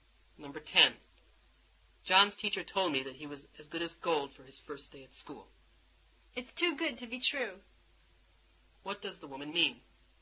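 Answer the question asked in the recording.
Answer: She can hardly believe that John behaved so well.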